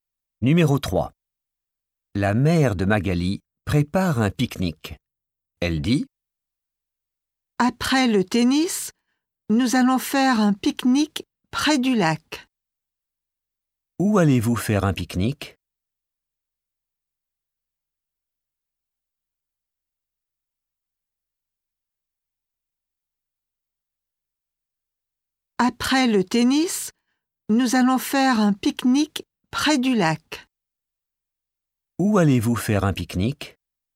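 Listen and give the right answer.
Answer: près du lac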